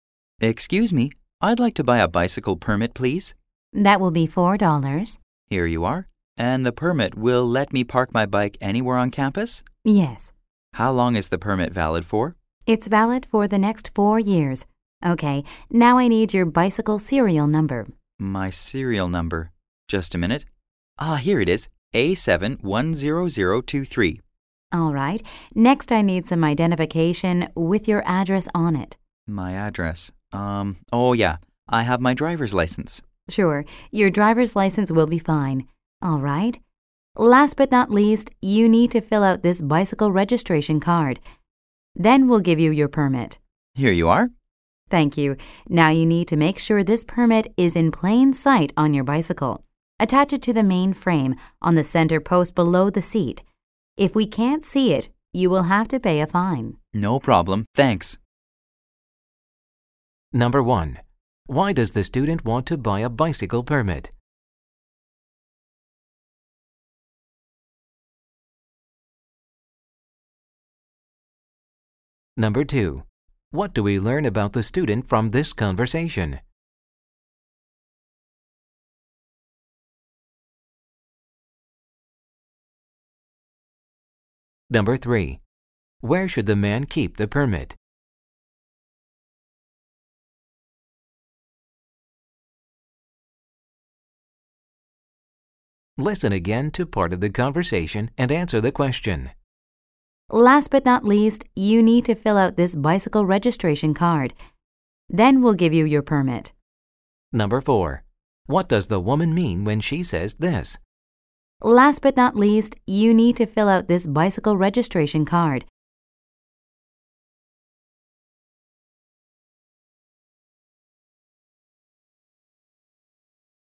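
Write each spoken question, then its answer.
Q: Why does the student want to buy a bicycle permit?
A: So he can park his bike anywhere on campus

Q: Where should the man keep the permit?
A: In plain sight on the main frame, on the center post below the seat

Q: What does the woman mean when she says this?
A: Filling out the registration card is the final step before he gets the permit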